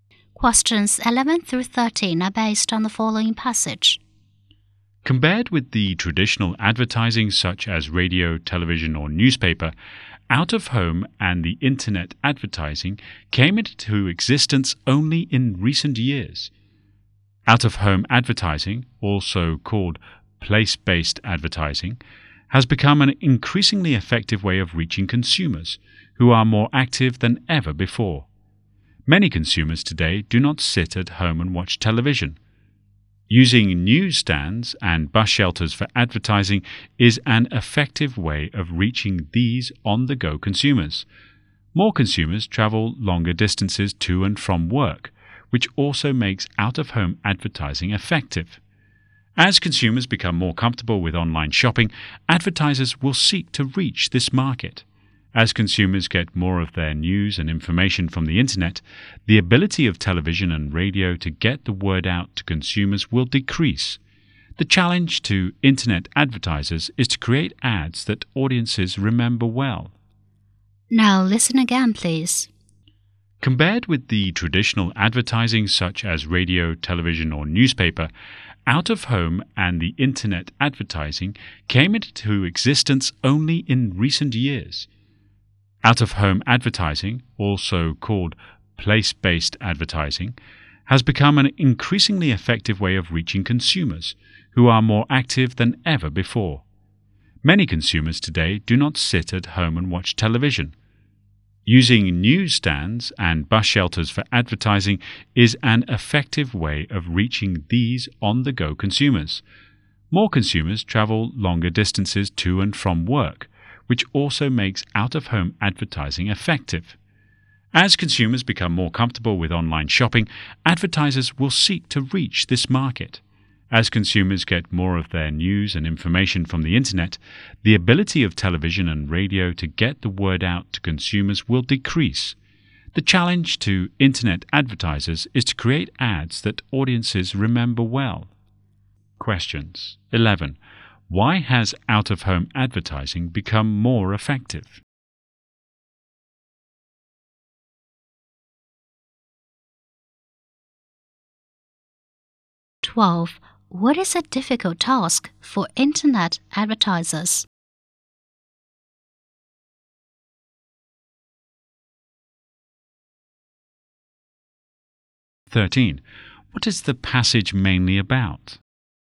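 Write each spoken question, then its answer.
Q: Why has out-of-home advertising become more effective?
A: Consumers are more active and travel more, not staying home

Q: What is a difficult task for internet advertisers?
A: Creating ads that audiences remember well

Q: What is the passage mainly about?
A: New forms of advertising: out-of-home and internet advertising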